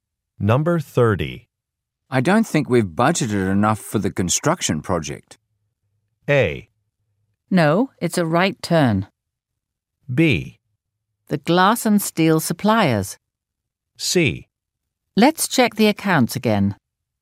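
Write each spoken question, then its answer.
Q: I don't think we've budgeted enough for the construction project.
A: C: Let's check the accounts again.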